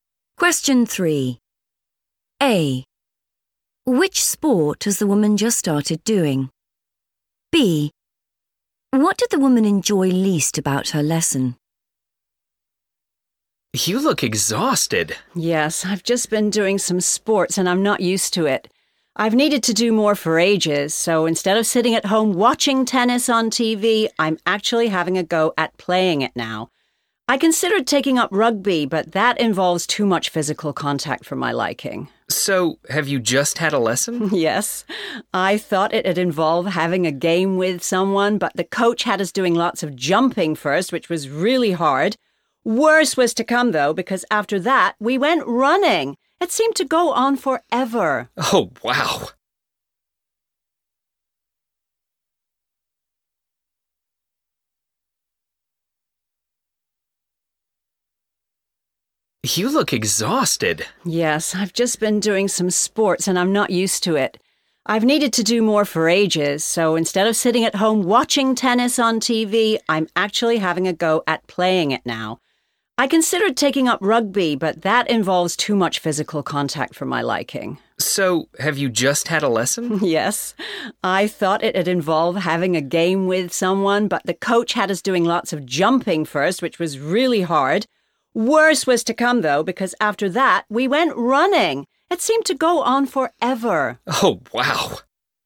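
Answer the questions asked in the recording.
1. tennis
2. running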